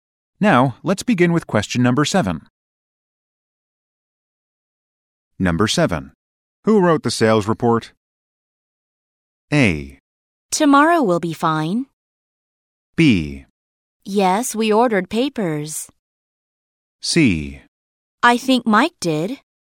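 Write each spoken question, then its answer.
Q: Who wrote the sales report?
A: C: I think Mike did.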